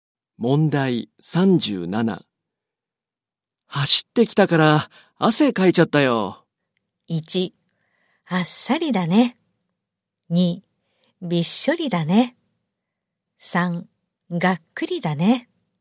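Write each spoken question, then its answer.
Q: 走ってきたから汗かいちゃったよ。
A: 2: びっしょりだね。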